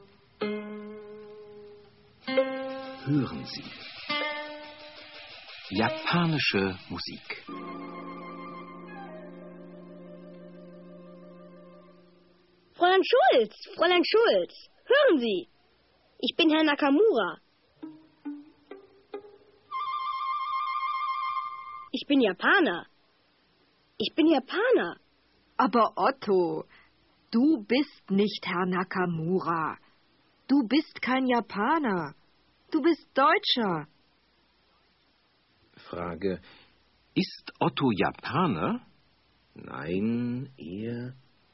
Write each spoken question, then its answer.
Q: Ist Otto Japaner?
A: Nein, er ist kein Japaner.